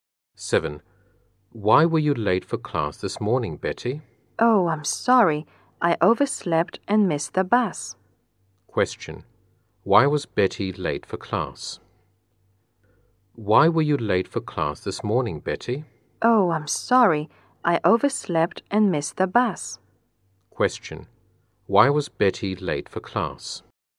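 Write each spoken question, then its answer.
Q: Why was Betty late for class?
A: She overslept and missed the bus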